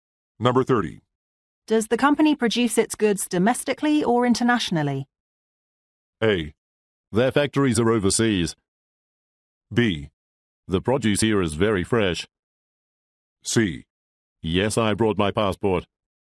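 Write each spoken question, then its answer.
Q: Does the company produce its goods domestically or internationally?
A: A: Their factories are overseas.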